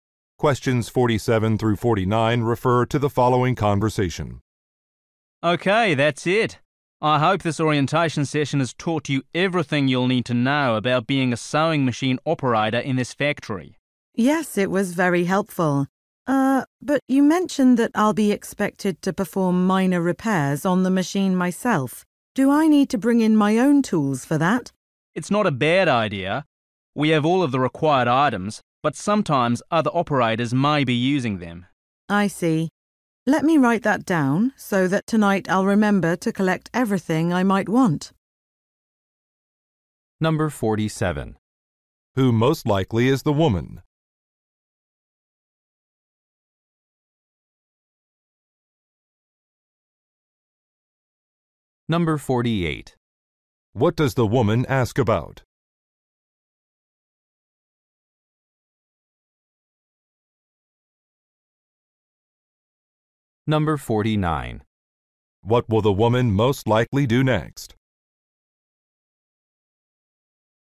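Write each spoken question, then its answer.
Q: Who most likely is the woman?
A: A new sewing machine operator.

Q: What does the woman ask about?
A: Whether she needs to bring her own tools.

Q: What will the woman most likely do next?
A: Write a note.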